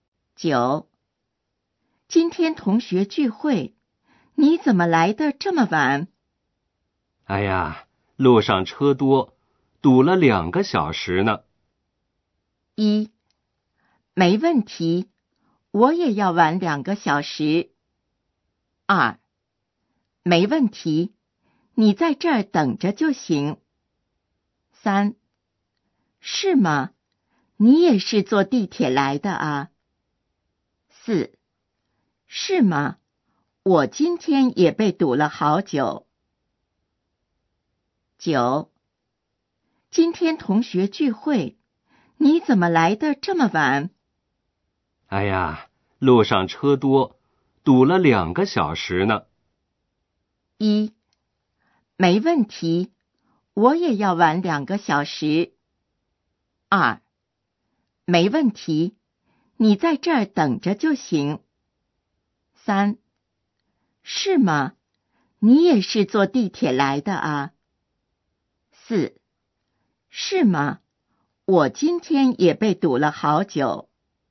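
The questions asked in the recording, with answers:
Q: 哎呀,路上车多,堵了两个小时呢。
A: 四: 是吗?我今天也被堵了好久。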